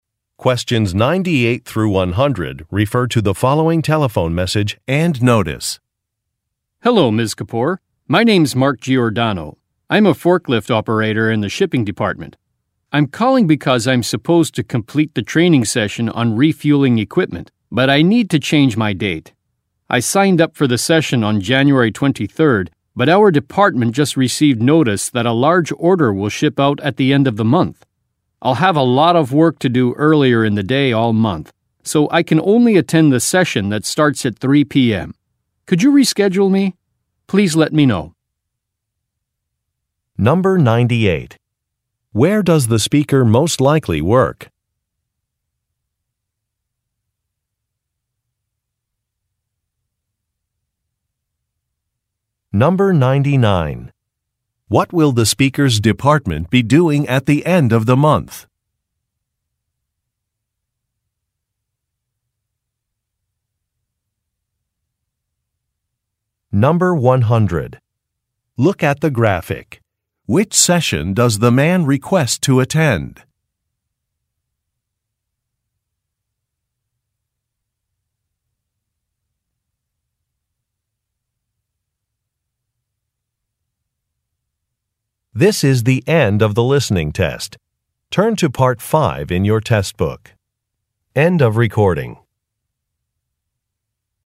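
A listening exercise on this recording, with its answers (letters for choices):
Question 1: Where does the speaker most likely work?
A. At a boat dock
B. At an auto repair shop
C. At a warehouse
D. At a job training school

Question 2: What will the speaker's department be doing at the end of the month?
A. Fixing some equipment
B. Attending a trade show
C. Interviewing job candidates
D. Preparing a large order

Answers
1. C
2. D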